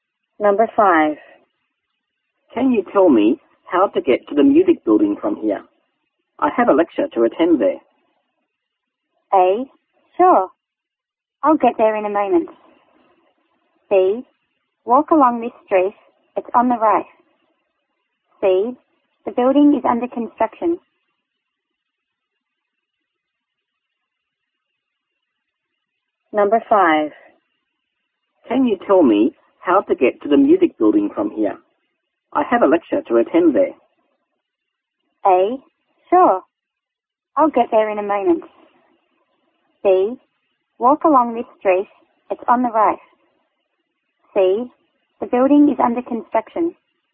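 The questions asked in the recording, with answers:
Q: Can you tell me how to get to the music building from here?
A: B: Walk along this street. It's on the right.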